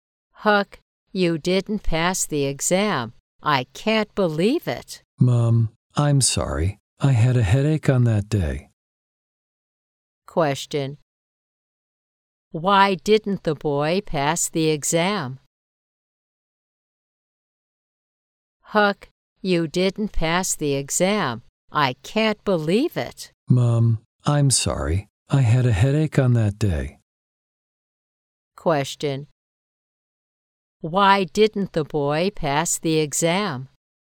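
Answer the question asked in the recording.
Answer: He had a headache on that day.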